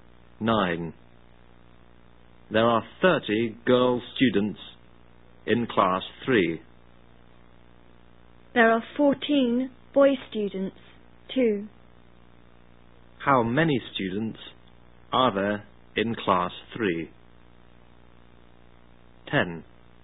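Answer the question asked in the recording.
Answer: 44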